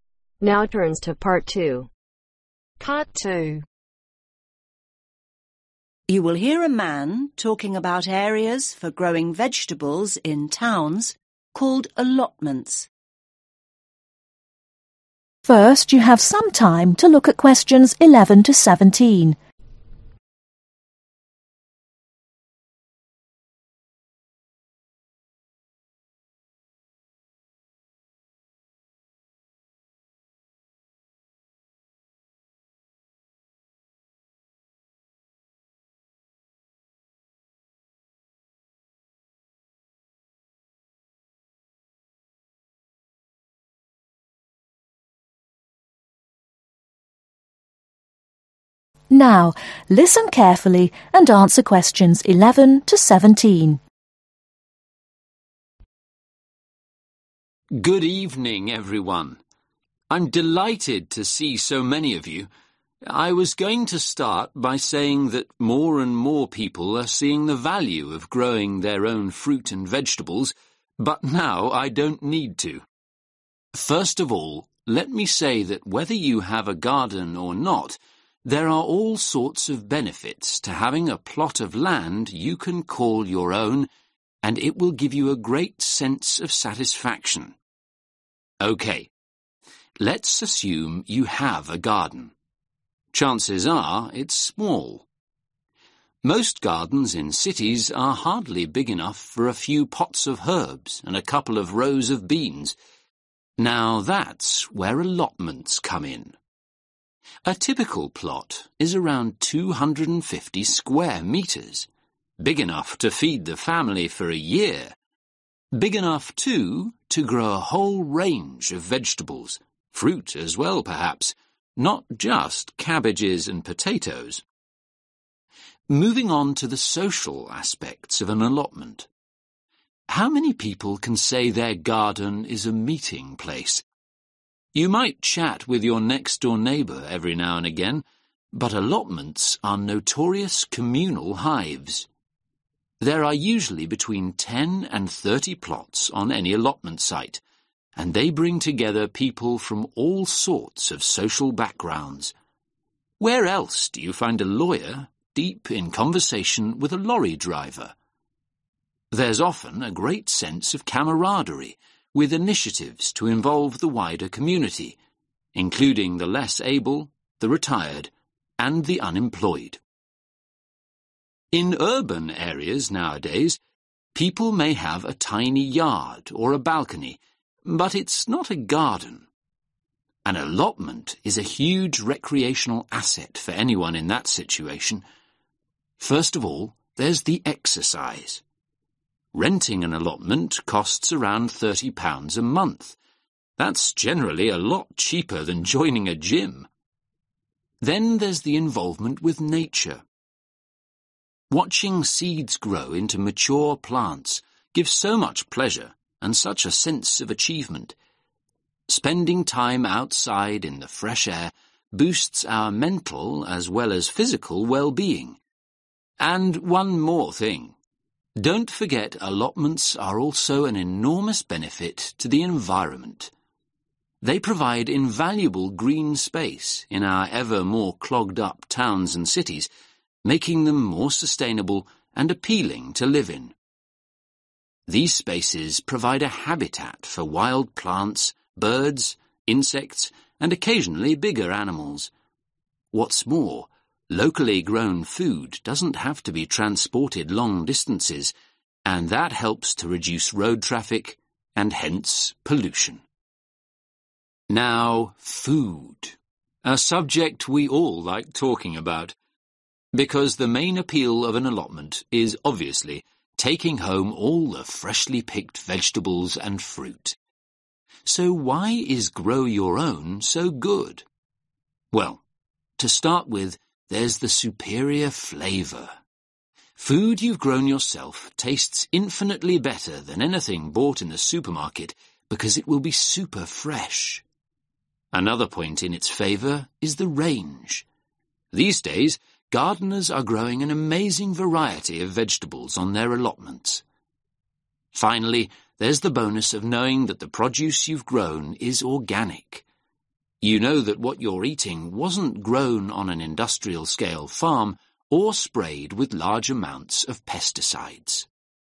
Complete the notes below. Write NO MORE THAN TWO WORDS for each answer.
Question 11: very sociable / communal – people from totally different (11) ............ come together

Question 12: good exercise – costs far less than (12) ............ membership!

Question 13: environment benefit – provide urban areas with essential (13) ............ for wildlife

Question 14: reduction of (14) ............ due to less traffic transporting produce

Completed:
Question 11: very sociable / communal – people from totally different social backgrounds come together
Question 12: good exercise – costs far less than gym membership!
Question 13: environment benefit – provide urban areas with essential green space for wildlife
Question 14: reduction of pollution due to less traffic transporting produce